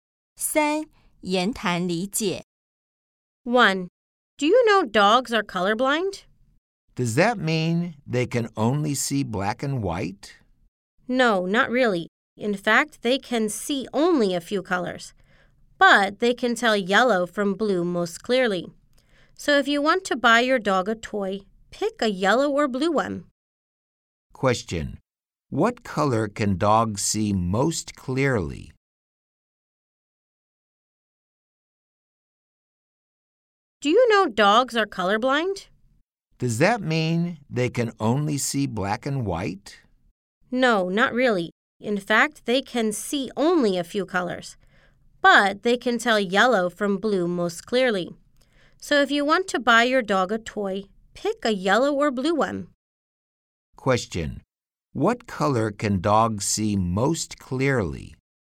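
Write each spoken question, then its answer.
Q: What color can dogs see most clearly?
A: Yellow and blue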